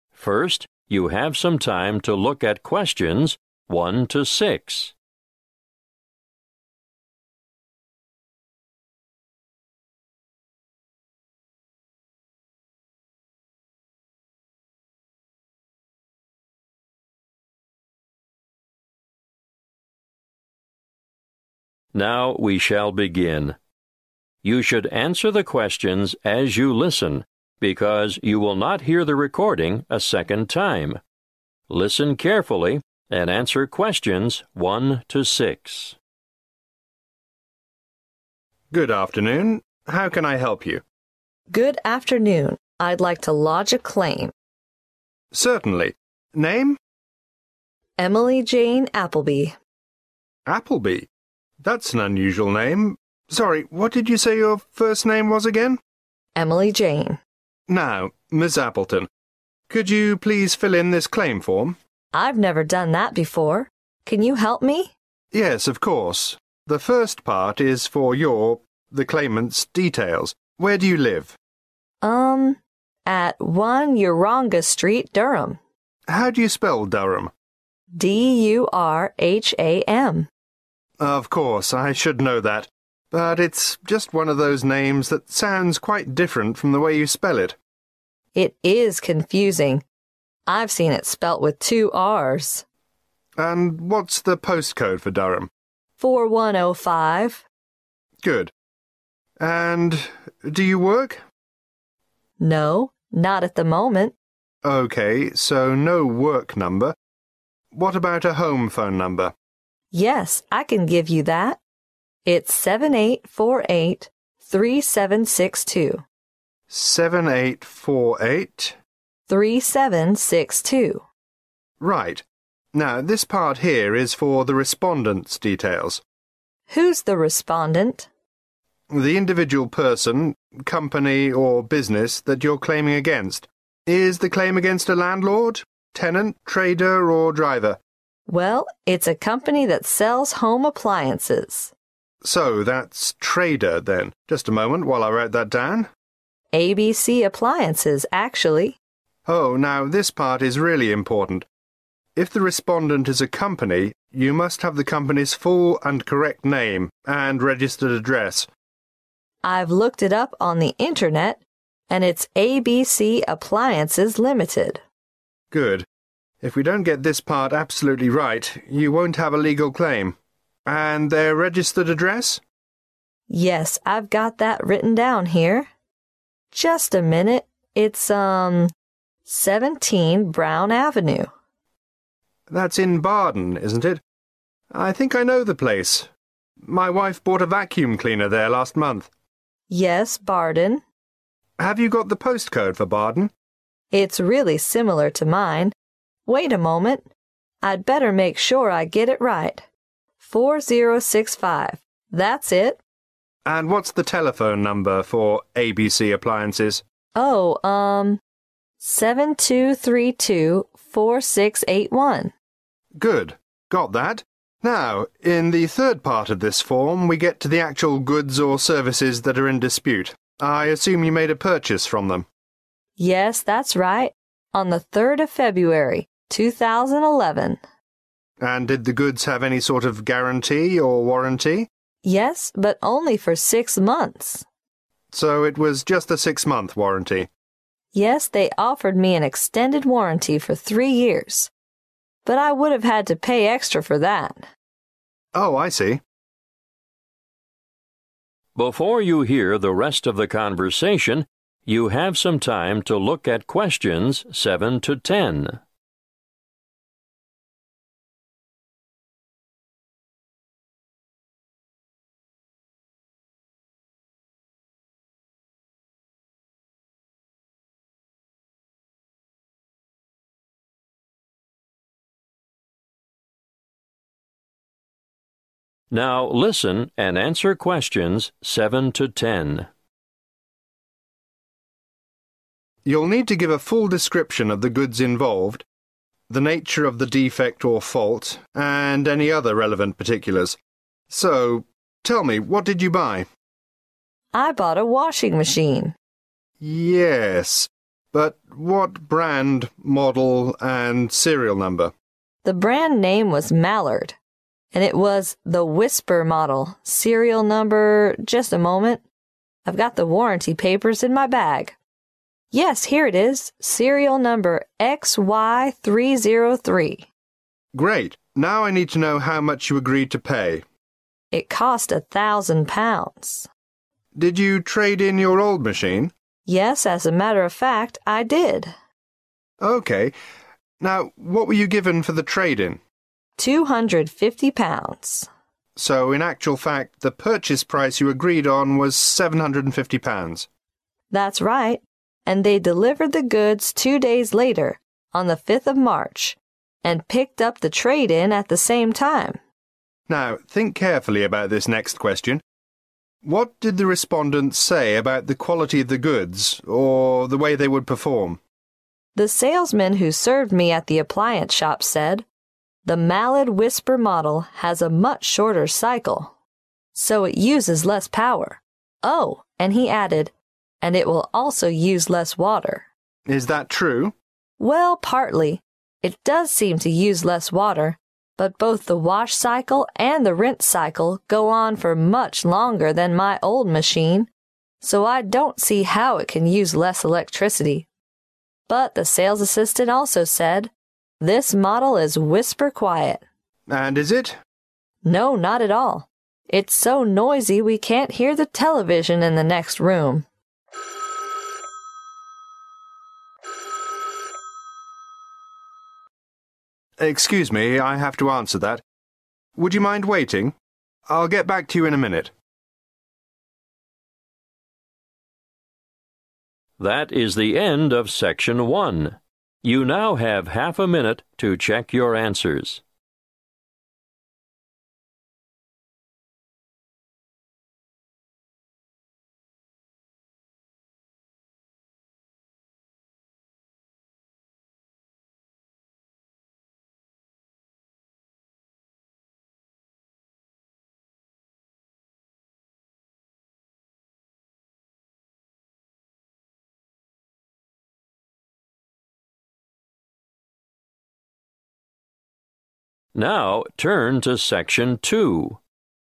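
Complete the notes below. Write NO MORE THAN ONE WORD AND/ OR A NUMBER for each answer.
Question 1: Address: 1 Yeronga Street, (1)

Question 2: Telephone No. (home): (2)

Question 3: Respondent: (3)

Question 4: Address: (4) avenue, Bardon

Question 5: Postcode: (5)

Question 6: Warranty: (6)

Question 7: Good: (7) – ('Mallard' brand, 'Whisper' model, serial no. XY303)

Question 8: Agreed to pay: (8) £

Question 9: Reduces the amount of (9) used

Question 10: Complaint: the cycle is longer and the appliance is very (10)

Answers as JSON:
{"1": "Durham", "2": "78483762", "3": "trader", "4": "17 Brown", "5": "4065", "6": "6 months", "7": "washing machine", "8": "750", "9": "water", "10": "noisy"}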